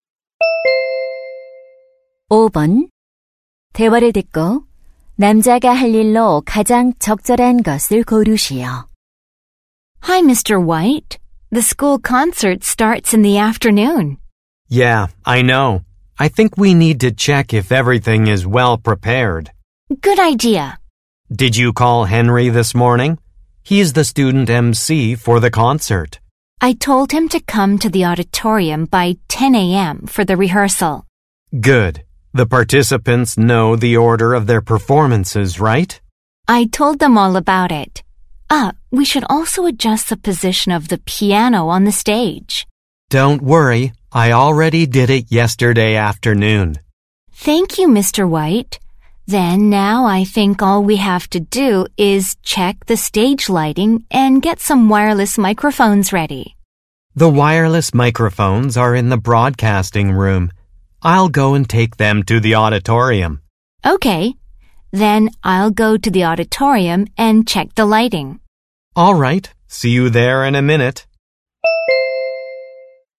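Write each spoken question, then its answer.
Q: 대화를 듣고 남자가 할 일로 가장 적절한 것을 고르시오.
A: 무선 마이크를 강당으로 가져가기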